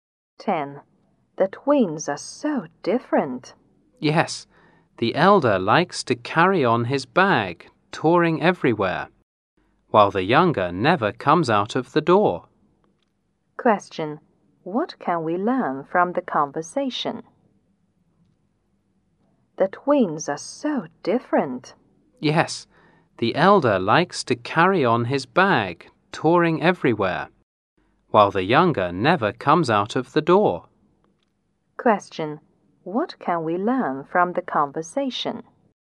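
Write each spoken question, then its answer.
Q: What can we learn from the conversation?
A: The older twin likes to travel, but the younger one never goes out.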